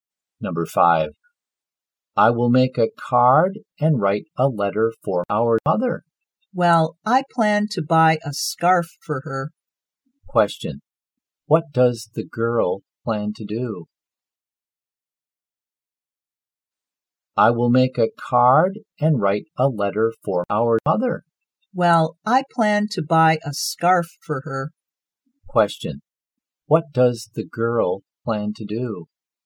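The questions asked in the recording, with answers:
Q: What does the girl plan to do?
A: Buy a scarf for her mother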